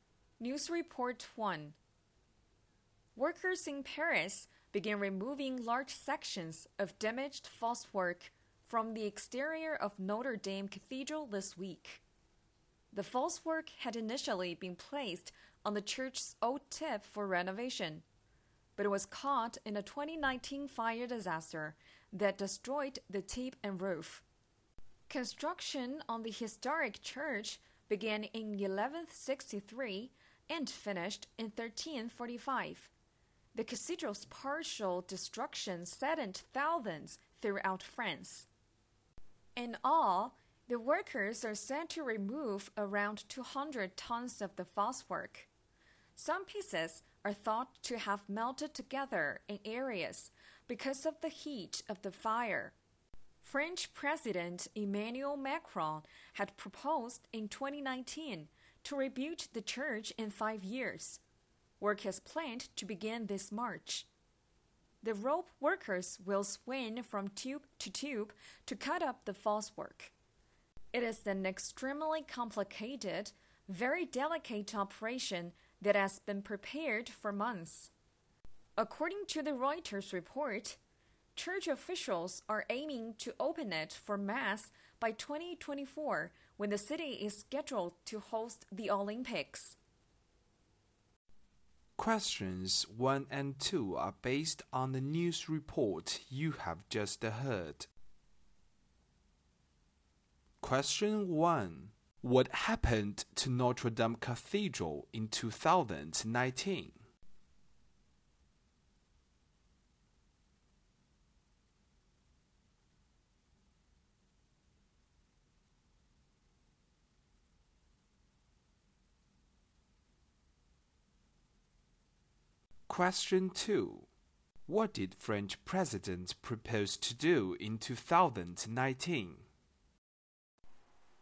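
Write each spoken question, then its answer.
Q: What happened to Notre Dame Cathedral in 2019?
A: It was damaged by a fire that destroyed its tip and roof.

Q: What did French President propose to do in 2019?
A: Rebuild the church in 5 years.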